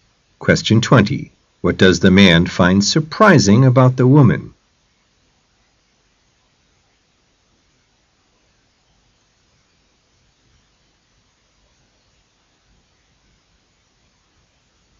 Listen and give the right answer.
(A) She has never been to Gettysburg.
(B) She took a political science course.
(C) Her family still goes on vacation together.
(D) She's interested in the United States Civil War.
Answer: (A) She has never been to Gettysburg.